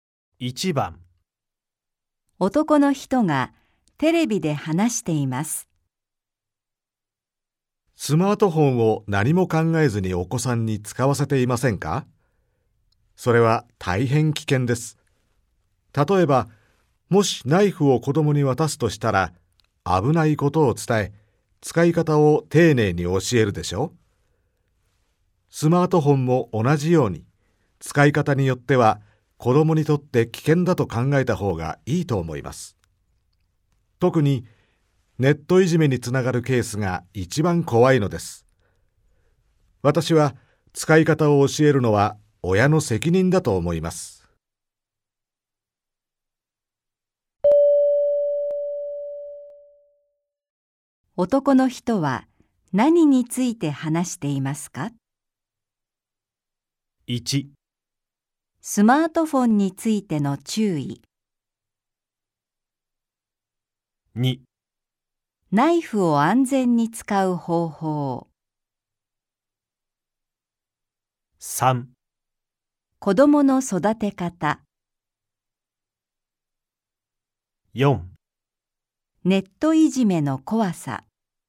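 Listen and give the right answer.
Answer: 1: スマートフォンについての注意。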